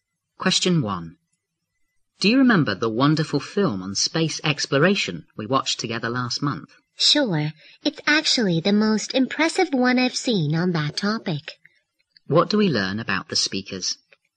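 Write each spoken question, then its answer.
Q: What do we learn about the speakers?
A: They watched an impressive film on space exploration together last month.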